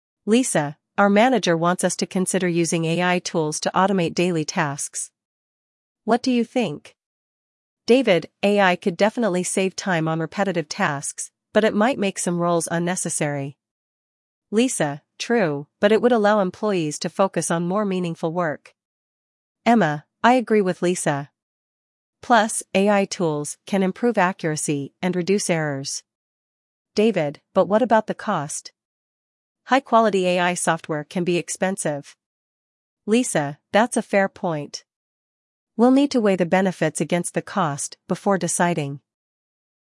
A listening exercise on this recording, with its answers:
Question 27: What is the team debating?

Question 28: What benefit does David mention about AI?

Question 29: What concern does David raise about AI?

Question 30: What advantage does Emma highlight?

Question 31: What do they agree to consider before deciding?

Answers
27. Using AI in daily operations
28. It saves time on repetitive tasks
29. AI can be expensive
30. AI improves accuracy
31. Benefits vs. cost

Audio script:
Lisa: Our manager wants us to consider using AI tools to automate daily tasks. What do you think?
David: AI could definitely save time on repetitive tasks, but it might make some roles unnecessary.
Lisa: True, but it would allow employees to focus on more meaningful work.
Emma: I agree with Lisa. Plus, AI tools can improve accuracy and reduce errors.
David: But what about the cost? High-quality AI software can be expensive.
Lisa: That's a fair point. We'll need to weigh the benefits against the cost before deciding.